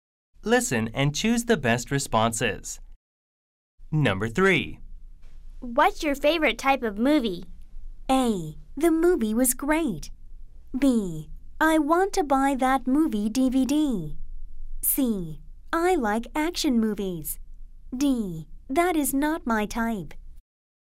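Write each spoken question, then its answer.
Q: What's your favorite type of movie?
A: C: I like action movies.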